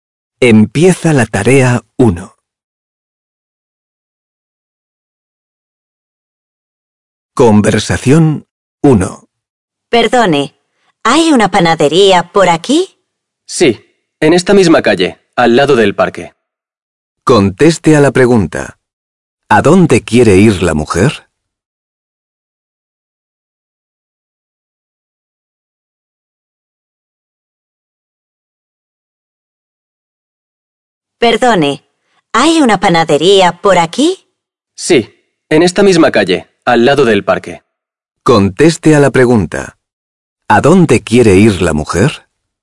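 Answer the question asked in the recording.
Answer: A una panadería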